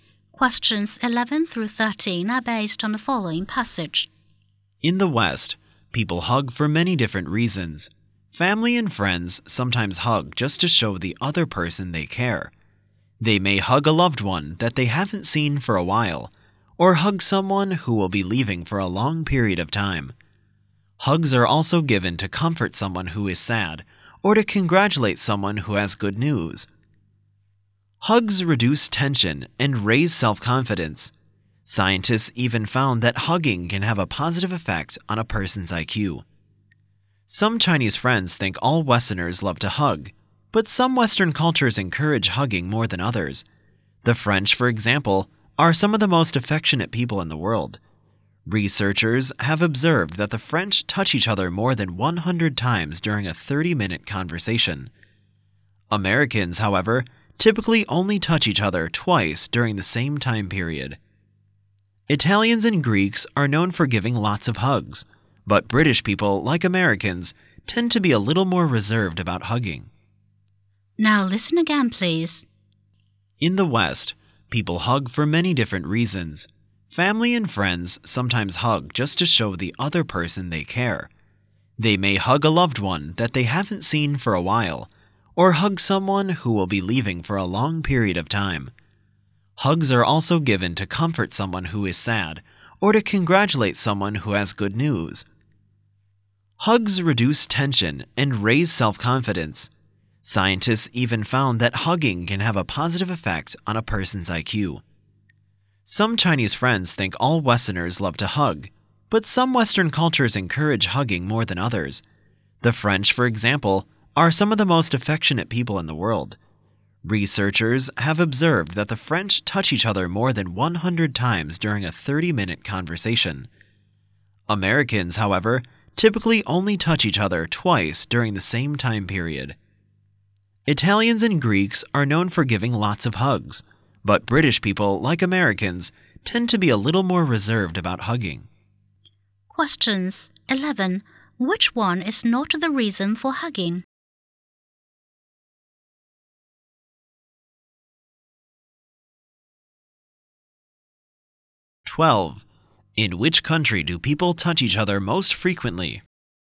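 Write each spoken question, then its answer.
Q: In which country do people touch each other most frequently?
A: France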